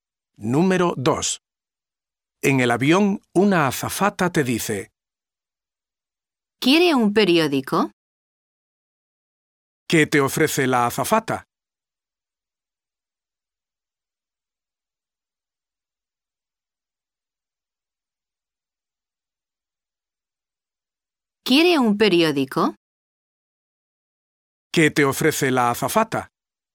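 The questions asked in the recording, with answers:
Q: ¿Qué te ofrece la azafata?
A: Un periódico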